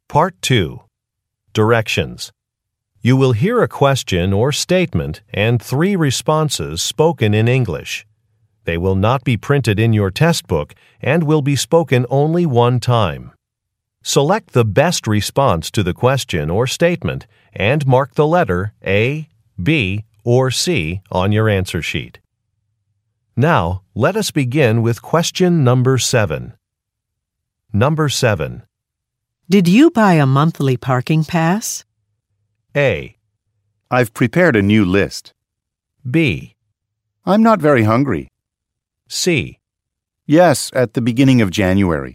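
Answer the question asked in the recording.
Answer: Yes, at the beginning of January.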